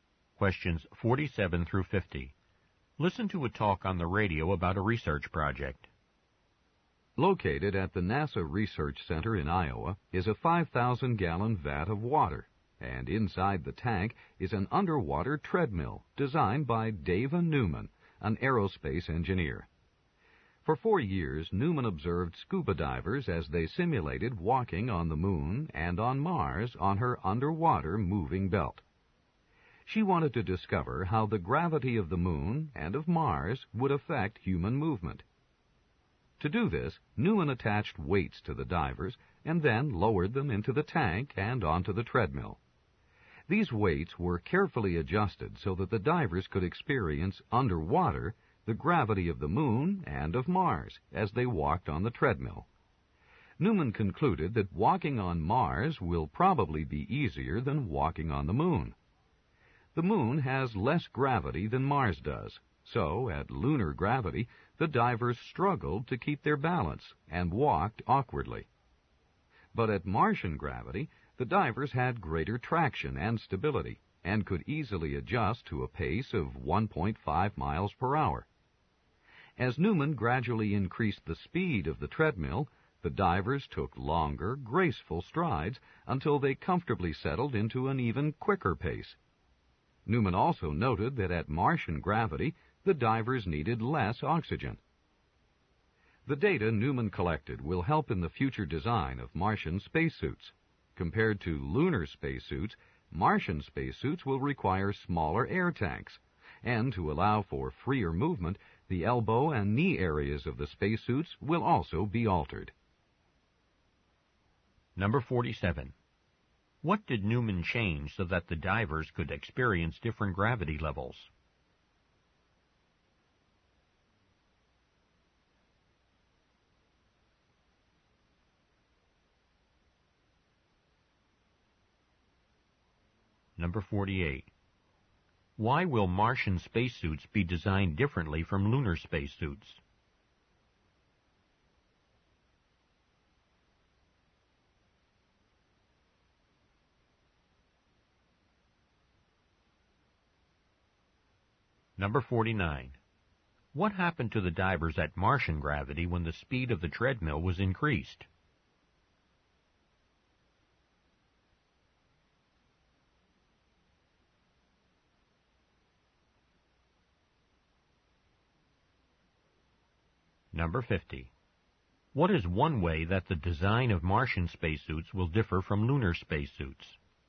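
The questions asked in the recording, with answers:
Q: What did Newman change so that the divers could experience different gravity levels?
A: The weights attached to the divers

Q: What happened to the divers at Martian gravity when the speed of the treadmill was increased?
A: They took longer, graceful strides

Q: What is one way that the design of Martian spacesuits will differ from lunar spacesuits?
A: Smaller air tanks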